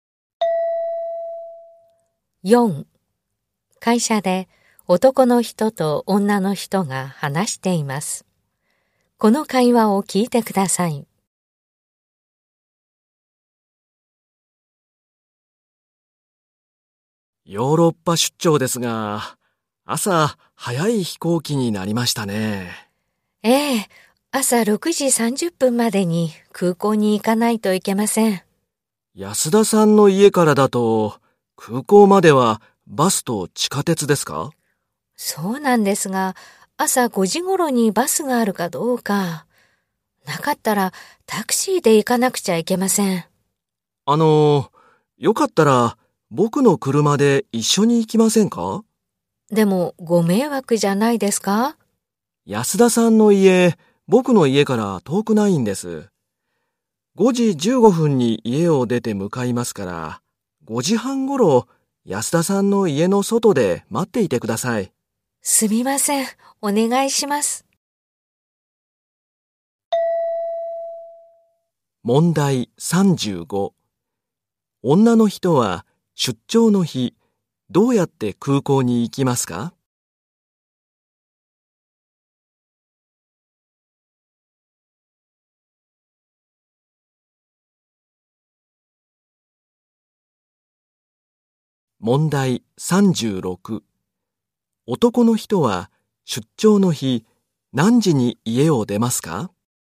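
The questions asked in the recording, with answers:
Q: 女の人は出張の日、どうやって空港に行きますか?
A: 男の人の車で行く

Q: 男の人は出張の日、何時に家を出ますか?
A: 5時15分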